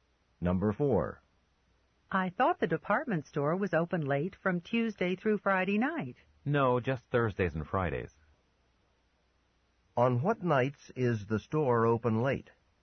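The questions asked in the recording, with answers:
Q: On what nights is the store open late?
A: Thursdays and Fridays.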